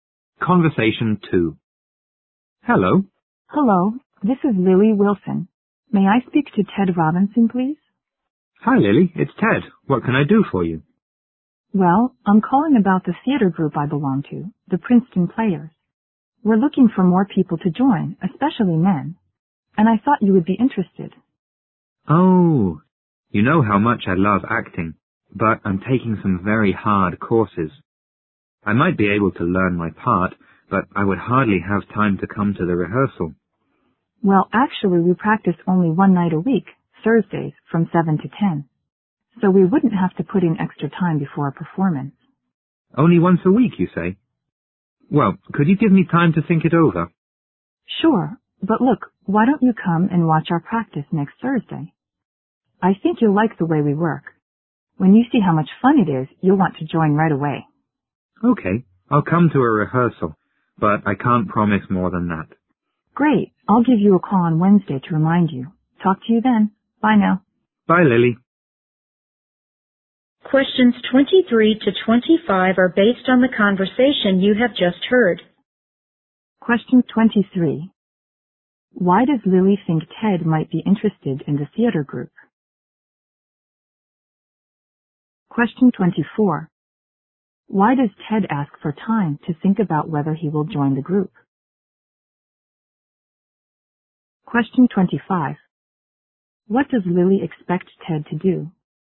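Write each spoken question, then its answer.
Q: Why does Lily think Ted might be interested in the theater group?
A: He loves acting

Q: Why does Ted ask for time to think about whether he will join the group?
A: He is taking hard courses and is busy

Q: What does Lily expect Ted to do?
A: Come and watch the rehearsal next Thursday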